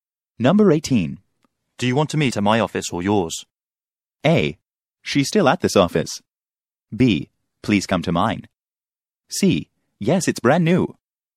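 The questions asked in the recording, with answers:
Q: Do you want to meet at my office or yours?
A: B: Please come to mine.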